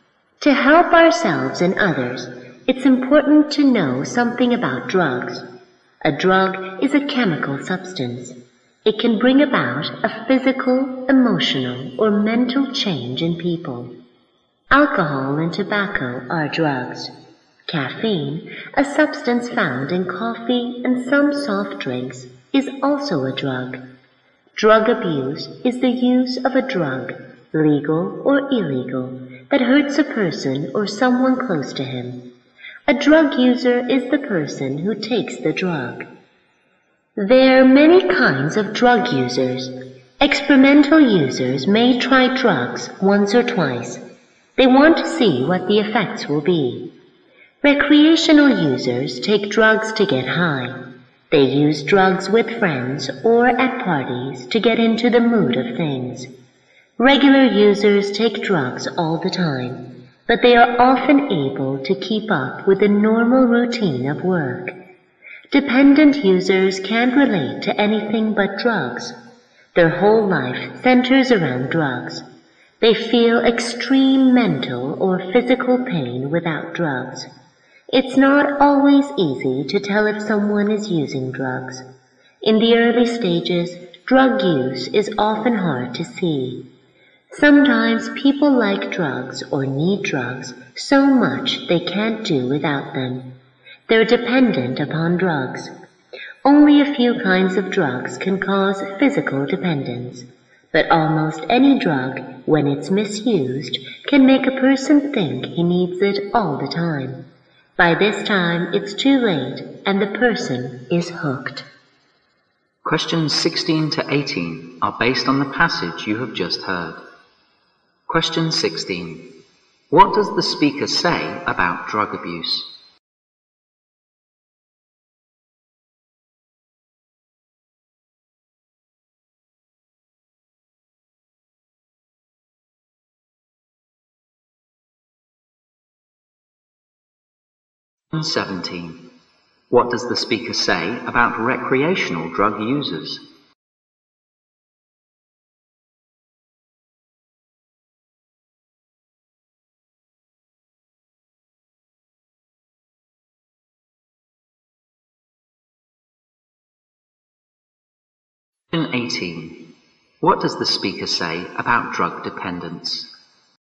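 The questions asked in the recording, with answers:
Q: What does the speaker say about drug abuse?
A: It is the use of a drug, legal or illegal, that hurts a person or someone close to him.

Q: What does the speaker say about recreational drug users?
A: They take drugs to get high, with friends or at parties to get into the mood.

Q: What does the speaker say about drug dependence?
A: Only a few drugs cause physical dependence, but almost any misused drug can make a person think he needs it all the time.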